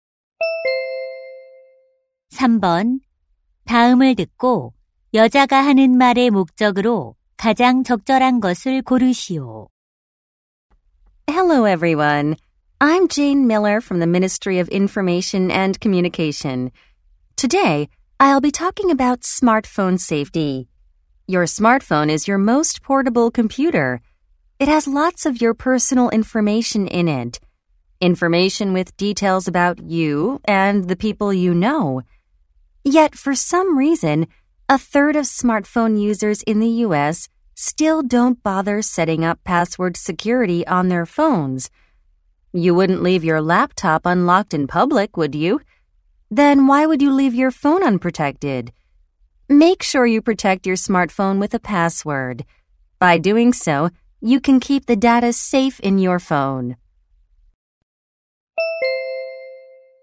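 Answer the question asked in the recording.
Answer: 스마트폰에 비밀번호를 설정하도록 권장하려고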